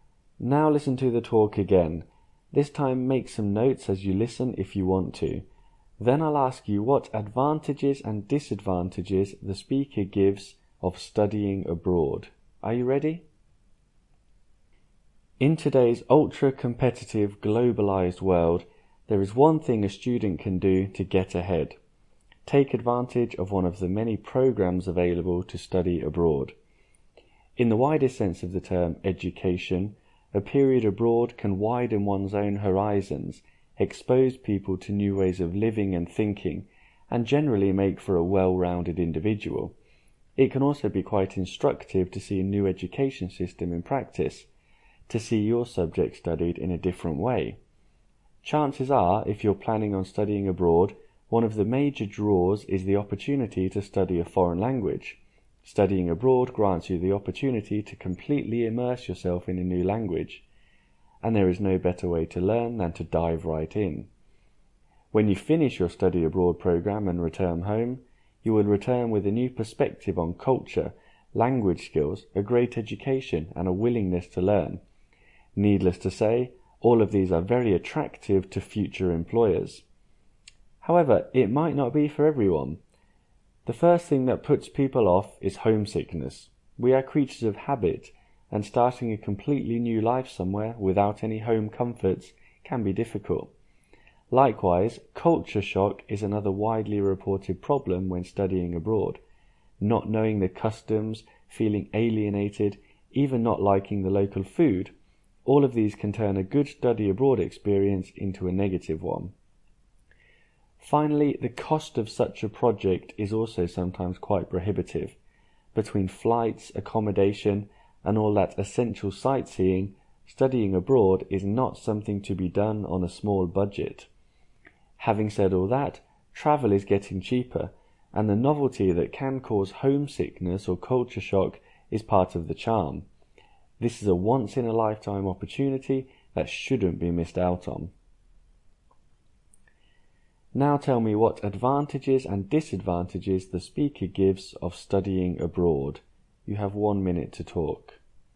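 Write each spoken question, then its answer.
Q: Now tell me what advantages and disadvantages the speaker gives of studying abroad.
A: Advantages: wider horizons, new education system, language immersion, attractive to employers. Disadvantages: homesickness, culture shock, high cost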